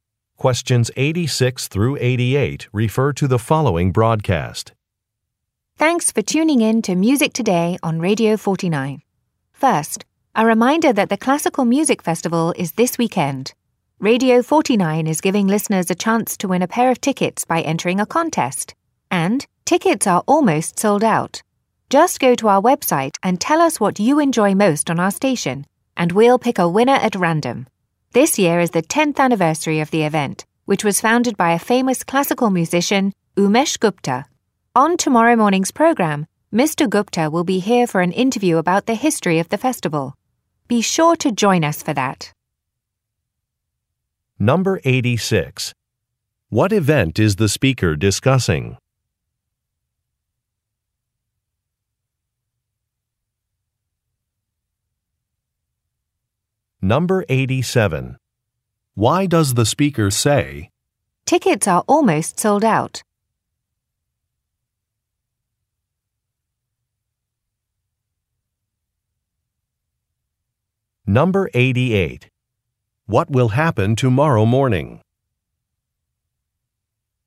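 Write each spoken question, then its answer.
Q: What event is the speaker discussing?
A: A classical music festival

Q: What will happen tomorrow morning?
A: The festival's founder, Umesh Gupta, will be interviewed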